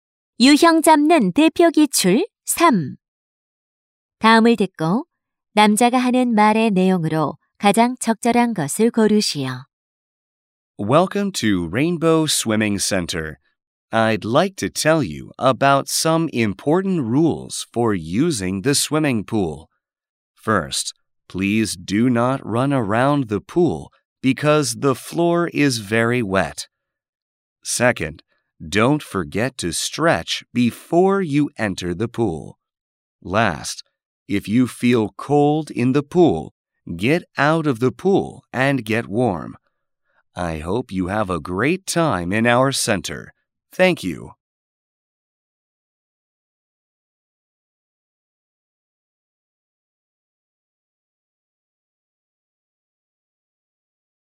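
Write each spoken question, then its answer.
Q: 다음을 듣고 남자가 하는 말의 내용으로 가장 적절한 것을 고르시오.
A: 수영장 이용 시 지켜야 할 안전 규칙 안내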